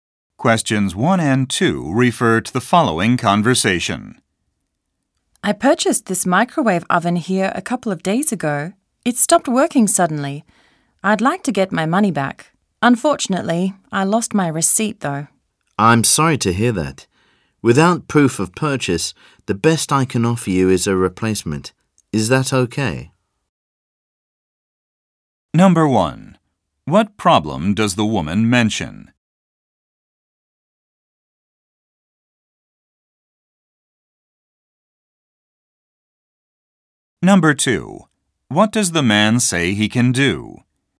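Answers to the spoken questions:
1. Her microwave oven stopped working suddenly
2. Offer her a replacement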